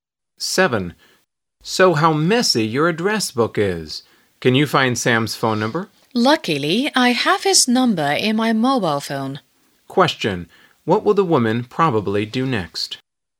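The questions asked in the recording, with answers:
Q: What will the woman probably do next?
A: Look up Sam's number in her mobile phone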